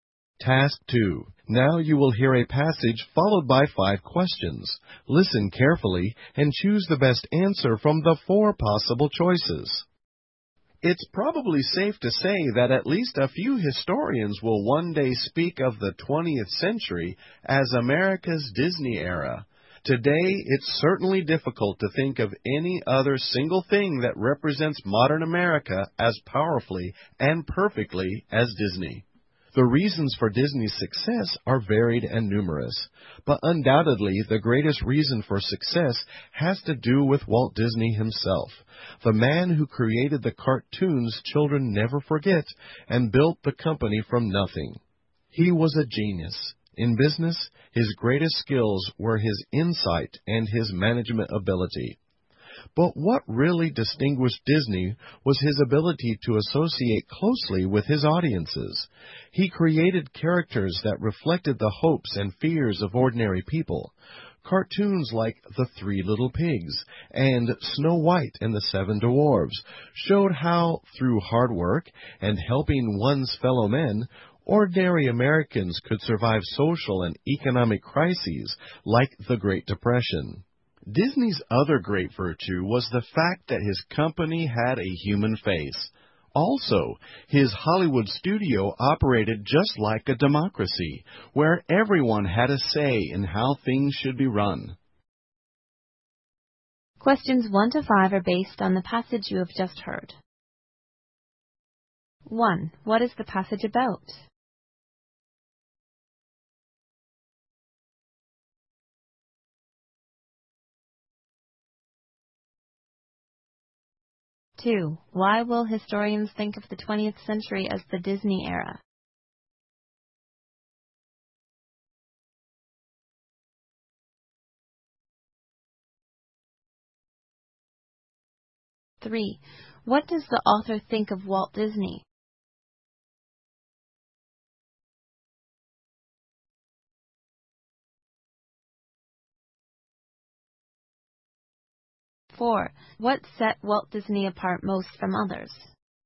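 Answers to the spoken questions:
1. Walt Disney and the reasons for Disney's success
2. Disney represents modern America powerfully and perfectly
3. He was a genius
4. His ability to associate closely with his audiences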